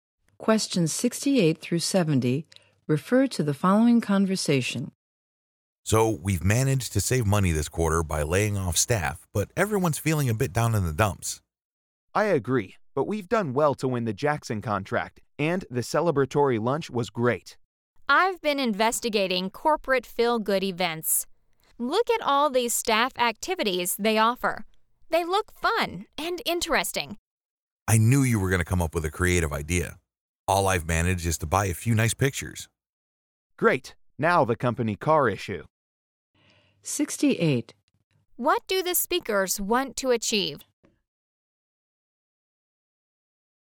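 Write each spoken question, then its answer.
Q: What do the speakers want to achieve?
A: Improve staff morale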